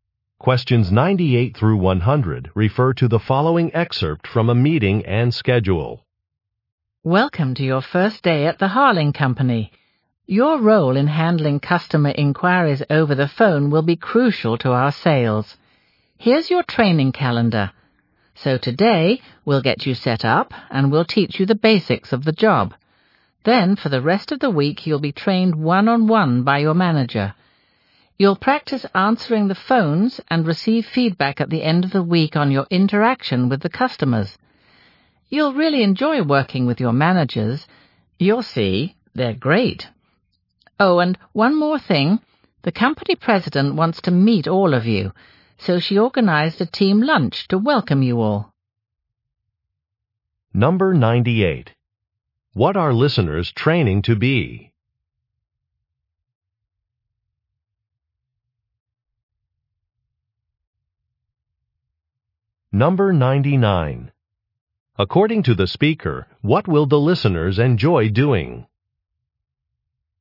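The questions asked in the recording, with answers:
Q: What are listeners training to be?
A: Customer service phone representatives.

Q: According to the speaker, what will the listeners enjoy doing?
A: Working with their managers.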